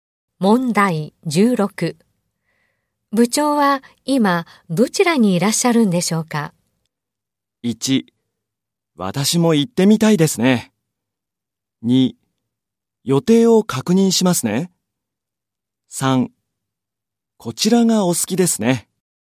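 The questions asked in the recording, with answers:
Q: 部長は今どちらにいらっしゃるんでしょうか?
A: 2: 予定を確認しますね。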